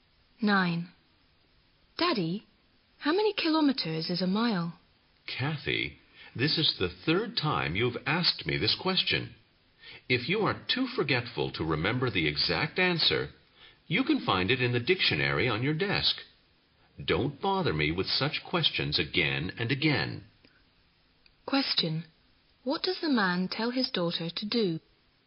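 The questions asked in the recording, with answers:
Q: What does the man tell his daughter to do?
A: Look it up in the dictionary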